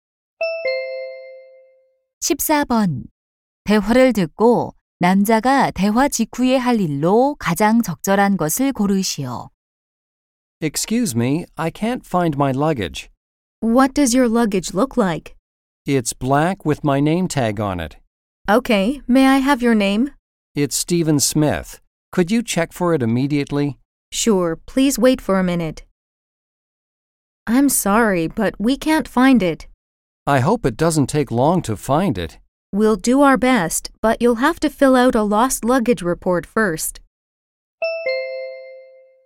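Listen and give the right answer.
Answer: 분실 수하물 신고서 작성하기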